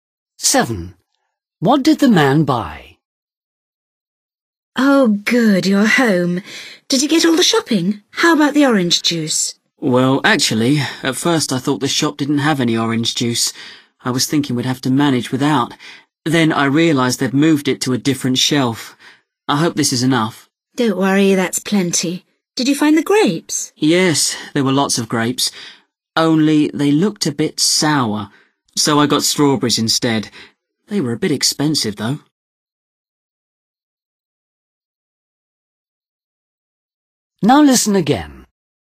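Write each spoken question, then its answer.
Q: What did the man buy?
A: orange juice and strawberries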